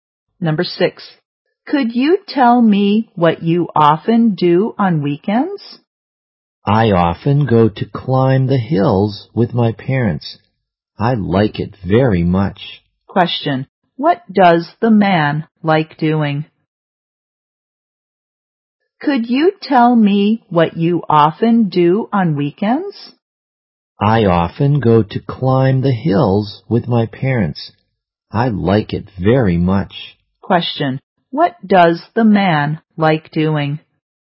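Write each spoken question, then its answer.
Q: What does the man like doing?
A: Climbing hills.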